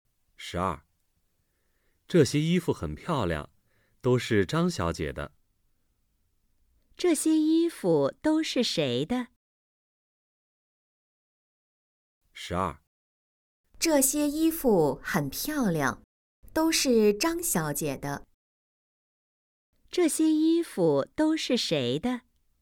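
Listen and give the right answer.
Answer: 张小姐的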